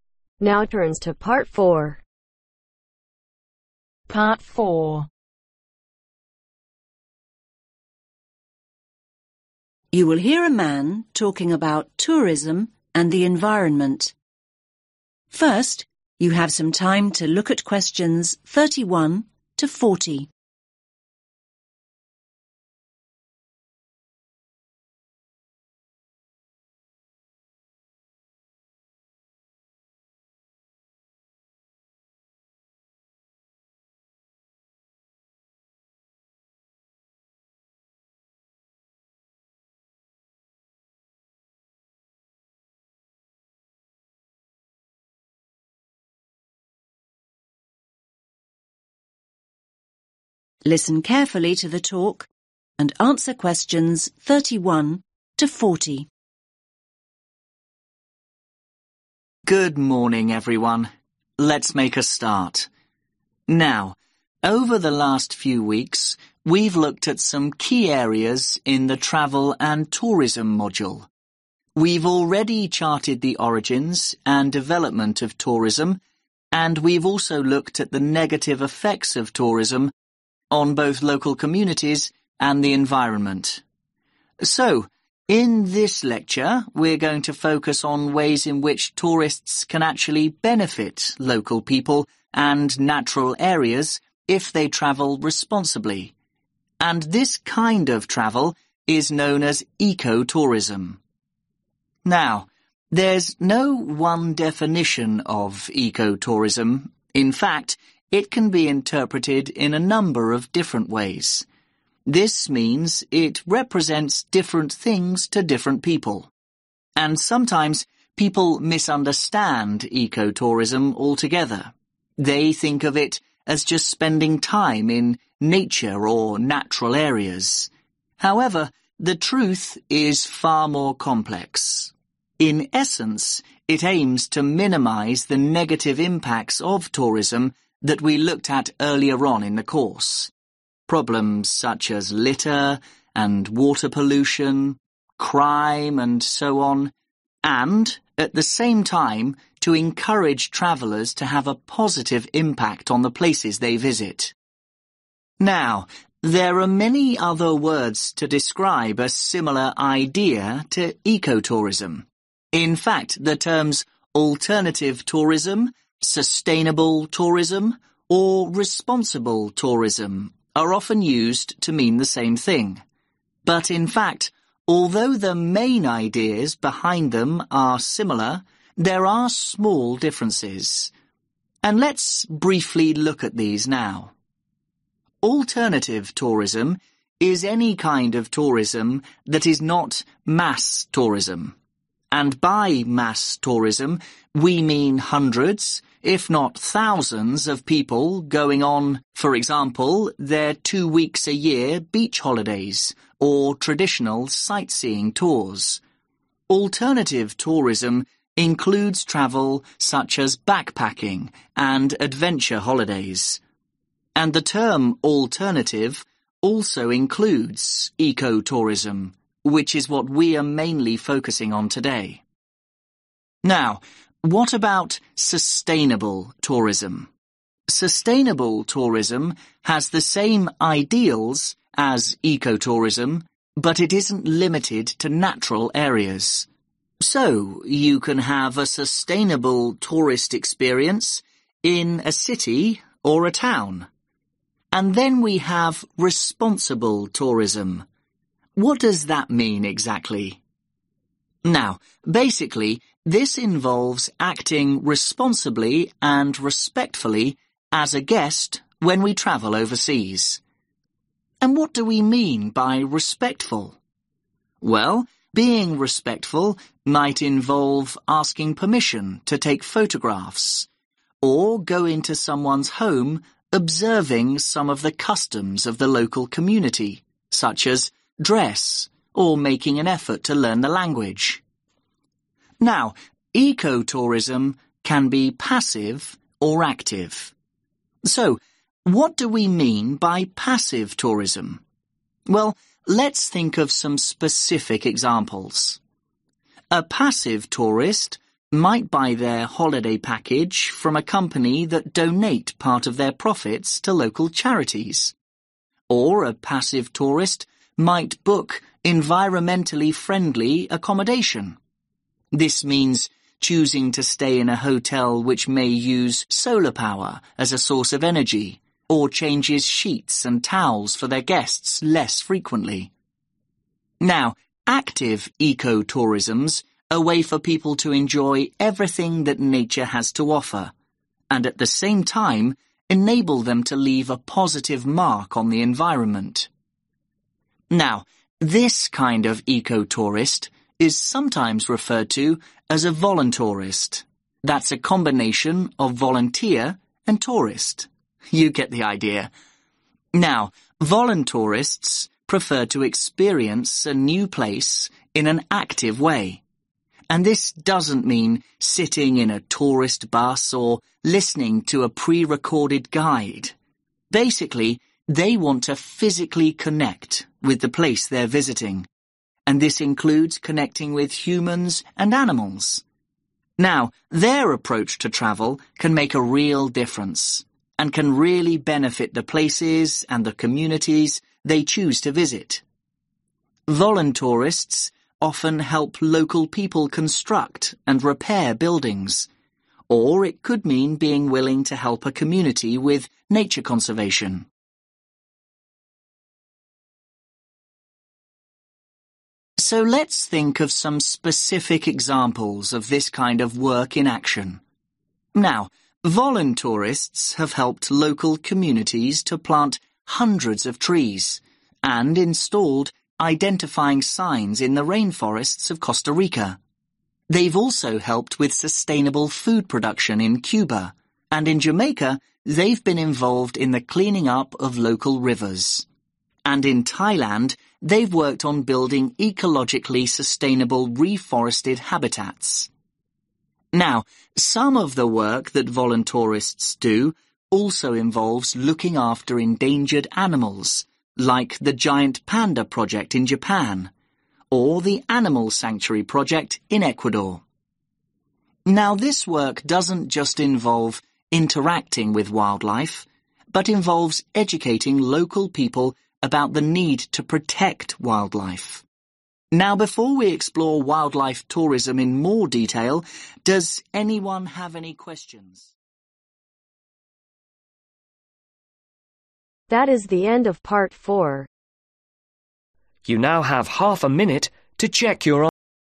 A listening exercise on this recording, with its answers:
Complete the notes below. Write ONE WORD ONLY for each answer.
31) To reduce then negative (31)............ of tourism (for example, rubbish, (32)............ and criminal activity).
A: Impacts

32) To reduce then negative (31)............ of tourism (for example, rubbish, (32)............ and criminal activity).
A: Pollution

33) Examples : water (33)............ and adventure trips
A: Backpacking

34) Shares the same (34)............ as eco-tourism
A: Ideals

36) Involves adhering to local (36)............ (for example, dress and language)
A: Customs

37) Involves assisting with building work in local communities and participating in nature (37)............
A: Conservation

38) Assistance with sustainable food (38)............ in Cuba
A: Production

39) Cleaning up local (39)............ in Jamaica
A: River

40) Animal conservation in (40)............ and Ecuador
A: Japan